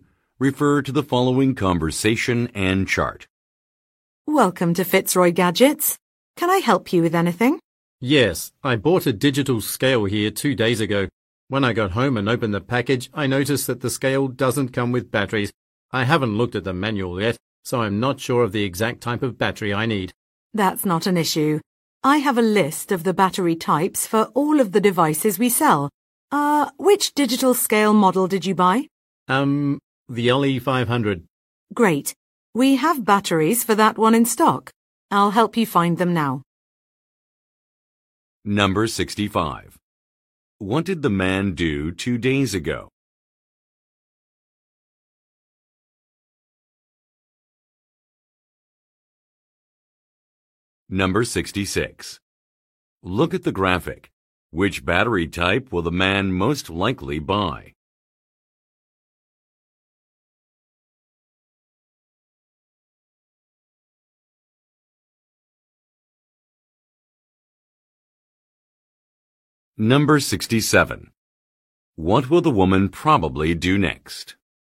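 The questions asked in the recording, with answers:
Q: What did the man do 2 days ago?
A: He bought a digital scale.

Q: What will the woman probably do next?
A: Help the man find the batteries.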